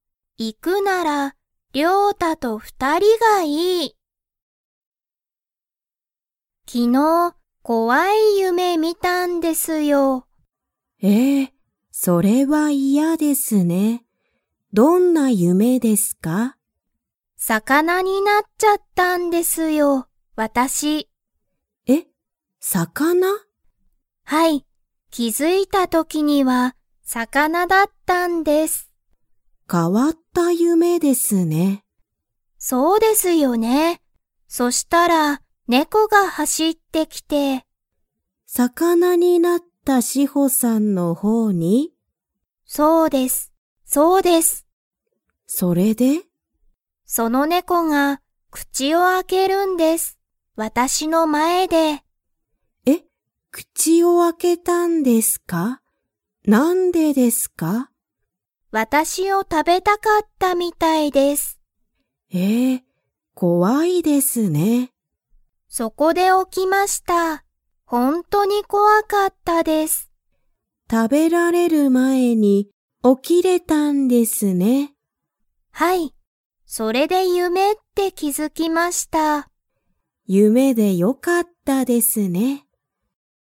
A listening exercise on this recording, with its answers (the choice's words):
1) 夢ゆめの中なかで、シホは何なにになりましたか?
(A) 魚さかな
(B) 猫ねこ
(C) 犬いぬ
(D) 人間にんげん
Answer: 魚さかな

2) シホは、猫ねこに食たべられる前まえに 。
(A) 起おきた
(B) 起おきなかった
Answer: 起おきた

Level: Level 3